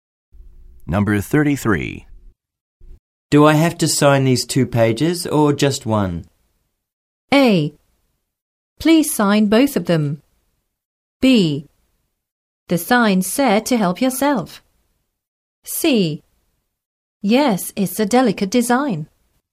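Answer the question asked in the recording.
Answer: A: Please sign both of them.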